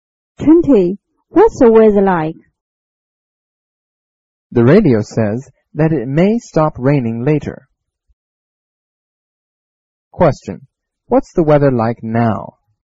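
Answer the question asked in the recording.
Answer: It's raining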